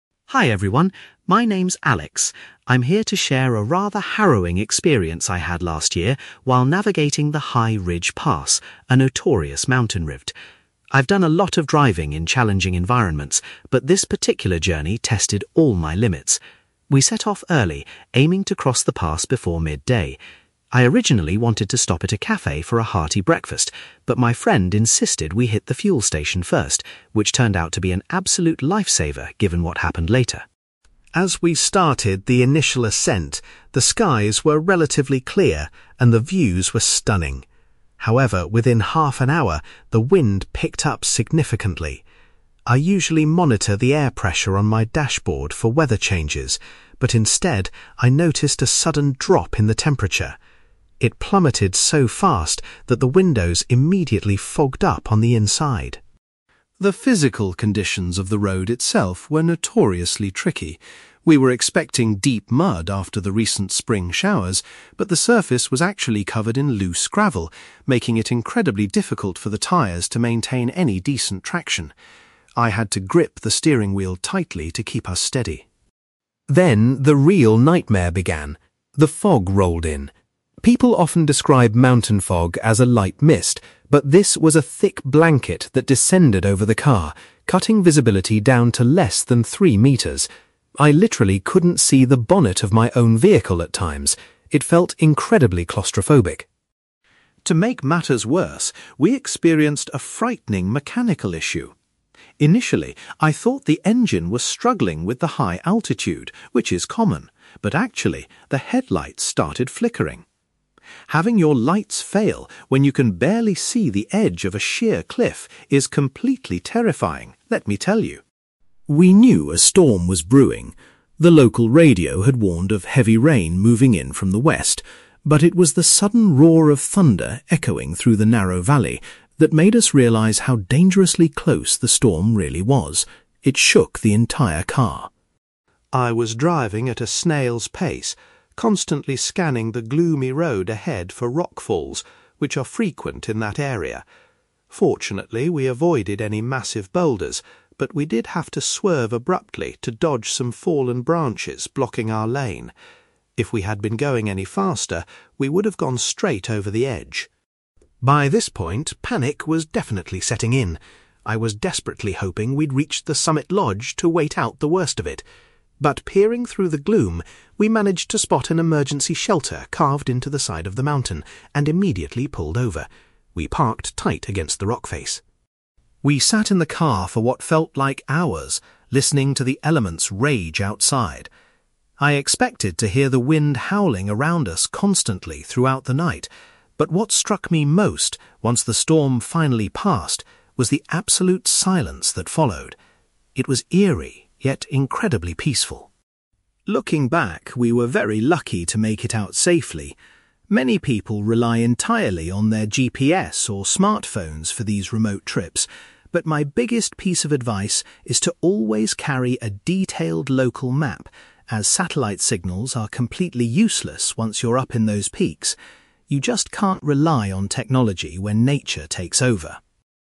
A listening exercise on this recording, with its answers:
You will hear a man called Alex sharing his experience of driving through a dangerous mountain pass during a storm. For questions 9-18, complete the sentences with a word or short phrase.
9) Alex was grateful that they decided to visit a (9)........................... before beginning their journey up the mountain.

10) The first indication that the weather was deteriorating was a rapid decrease in the (10)........................... .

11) Alex found driving difficult because the road surface was covered in (11)........................... .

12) Alex compares the fog that engulfed their vehicle to a (12)........................... .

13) Alex was terrified when the car's (13)........................... began to malfunction in the dark conditions.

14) Alex realized the storm was imminent when he heard the sound of (14)........................... .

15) Alex had to make a sudden steering maneuver to avoid some (15)........................... on the road.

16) Alex and his friend eventually decided to take refuge inside an (16)........................... until conditions improved.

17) Once the severe weather had passed, Alex was most surprised by the (17)........................... .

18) Alex strongly advises anyone driving in the mountains to bring a (18)........................... with them.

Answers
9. fuel station
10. temperature
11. gravel
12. thick blanket
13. headlights
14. thunder
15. fallen branches
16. emergency shelter
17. absolute silence
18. local map

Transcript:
I'm here to share a rather harrowing experience I had last year while navigating the High Ridge Pass, a notorious mountain route. I've done a lot of driving in challenging environments, but this particular journey tested all my limits. We set off early, aiming to cross the pass before midday. I originally wanted to stop at a café for a hearty breakfast, but my friend insisted we hit the fuel station first, which turned out to be an absolute lifesaver given what happened later.
As we started the initial ascent, the skies were relatively clear, and the views were stunning. However, within half an hour, the wind picked up significantly. I usually monitor the air pressure on my dashboard for weather changes, but instead, I noticed a sudden drop in the temperature. It plummeted so fast that the windows immediately fogged up on the inside.
The physical conditions of the road itself were notoriously tricky. We were expecting deep mud after the recent spring showers, but the surface was actually covered in loose gravel, making it incredibly difficult for the tires to maintain any decent traction. I had to grip the steering wheel tightly to keep us steady.
Then, the real nightmare began. The fog rolled in. People often describe mountain fog as a light mist, but this was a thick blanket that descended over the car, cutting visibility down to less than three metres. I literally couldn't see the bonnet of my own vehicle at times. It felt incredibly claustrophobic.
To make matters worse, we experienced a frightening mechanical issue. Initially, I thought the engine was struggling with the high altitude, which is common, but actually, the headlights started flickering. Having your lights fail when you can barely see the edge of a sheer cliff is completely terrifying, let me tell you.
We knew a storm was brewing. The local radio had warned of heavy rain moving in from the west, but it was the sudden roar of thunder echoing through the narrow valley that made us realize how dangerously close the storm really was. It shook the entire car.
I was driving at a snail's pace, constantly scanning the gloomy road ahead for rockfalls, which are frequent in that area. Fortunately, we avoided any massive boulders, but we did have to swerve abruptly to dodge some fallen branches blocking our lane. If we had been going any faster, we would have gone straight over the edge.
By this point, panic was definitely setting in. I was desperately hoping we'd reach the summit lodge to wait out the worst of it. But peering through the gloom, we managed to spot an emergency shelter carved into the side of the mountain and immediately pulled over. We parked tight against the rock face.
We sat in the car for what felt like hours, listening to the elements rage outside. I expected to hear the wind howling around us constantly throughout the night, but what struck me most once the storm finally passed was the absolute silence that followed. It was eerie, yet incredibly peaceful.
Looking back, we were very lucky to make it out safely. Many people rely entirely on their GPS or smartphones for these remote trips, but my biggest piece of advice is to always carry a detailed local map, as satellite signals are completely useless once you're up in those peaks. You just can't rely on technology when nature takes over.

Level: B2